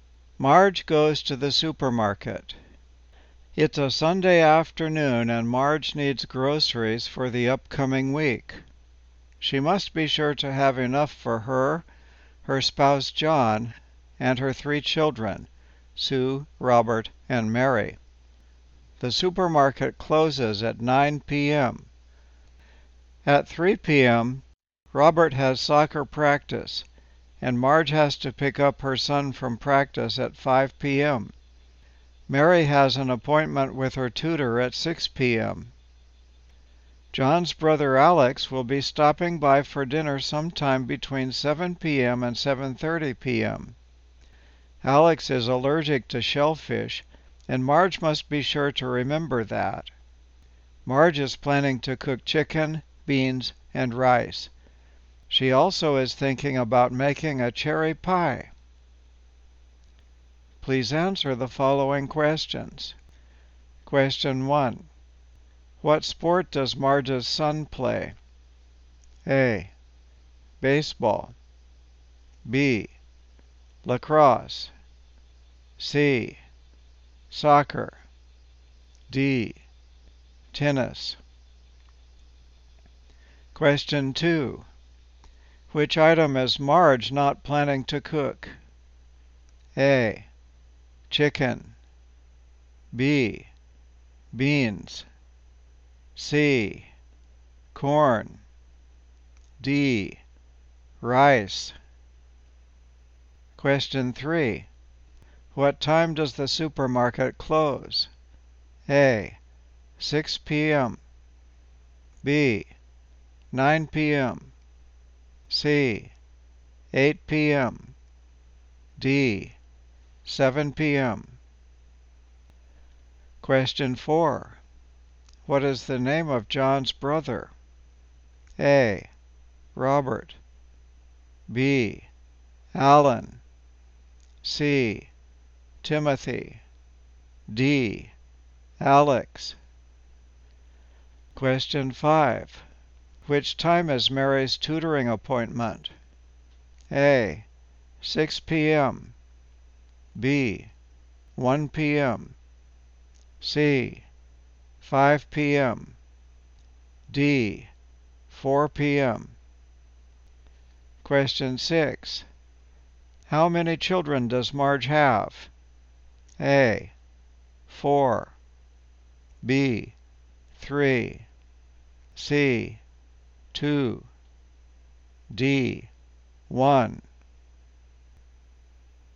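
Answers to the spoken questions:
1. C: Soccer.
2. C: Corn.
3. B: 9 p.m.
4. D: Alex.
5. A: 6 p.m.
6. B: 3.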